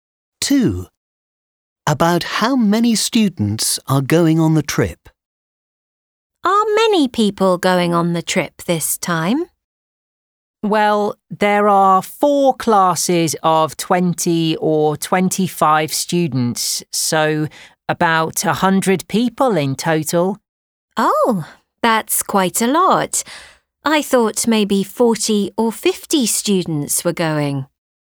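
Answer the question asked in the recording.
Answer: About 100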